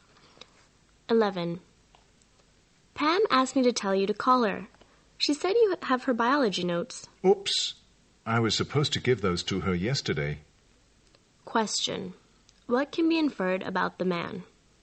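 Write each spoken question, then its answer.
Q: What can be inferred about the man?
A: He forgot to give Pam her notes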